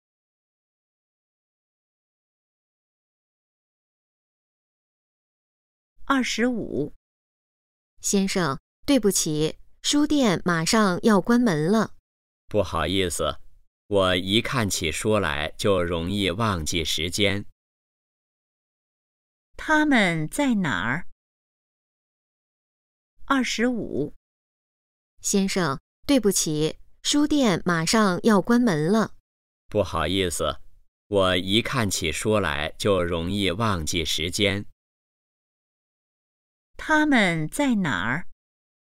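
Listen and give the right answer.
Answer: 书店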